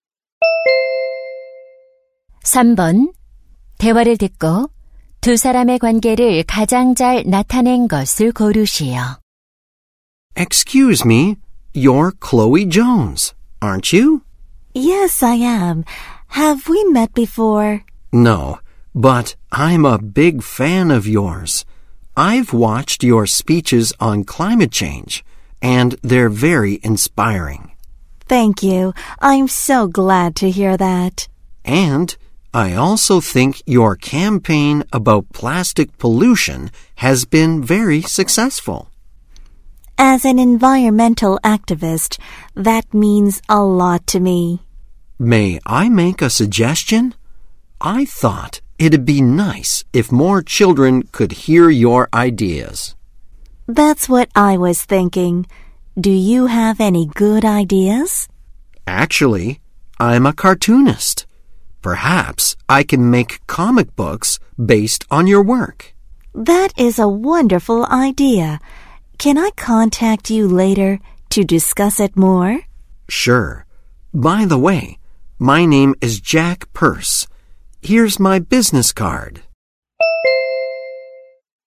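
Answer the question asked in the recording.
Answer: 환경 운동가 - 만화가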